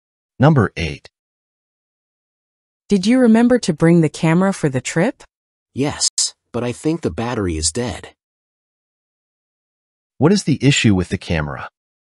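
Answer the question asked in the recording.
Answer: Its battery may be dead.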